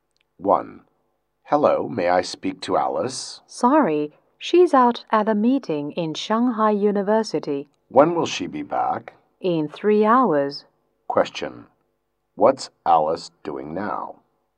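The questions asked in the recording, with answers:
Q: What's Alice doing now?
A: Attending a meeting at Shanghai University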